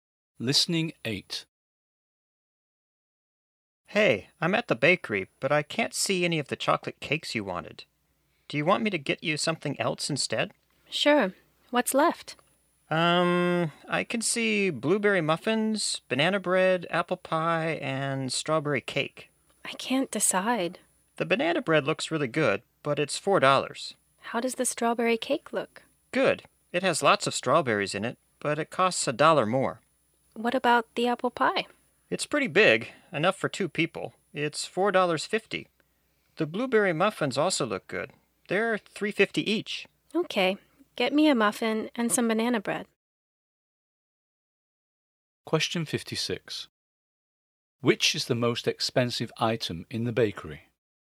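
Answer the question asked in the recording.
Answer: The strawberry cake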